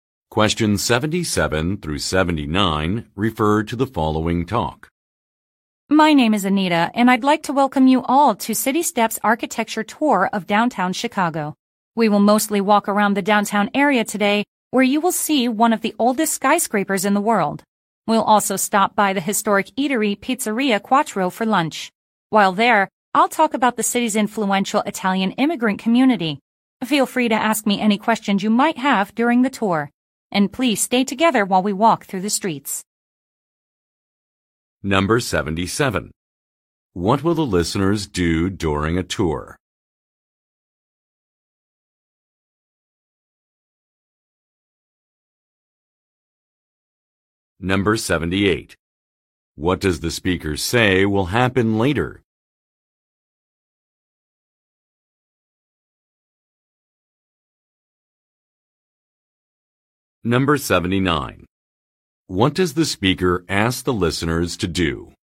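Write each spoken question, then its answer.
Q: What will the listeners do during a tour?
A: Walk around downtown Chicago and see one of the oldest skyscrapers in the world

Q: What does the speaker say will happen later?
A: They will stop for lunch at Pizzeria Quattro, and she will talk about the city's Italian immigrant community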